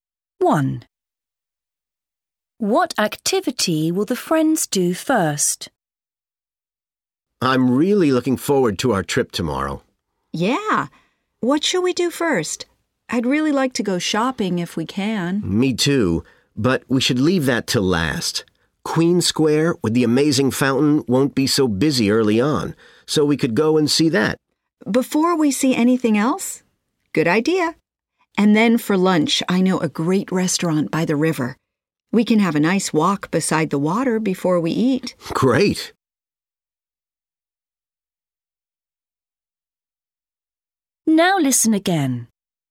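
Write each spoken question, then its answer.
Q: What activity will the friends do first?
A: See the fountain in Queen Square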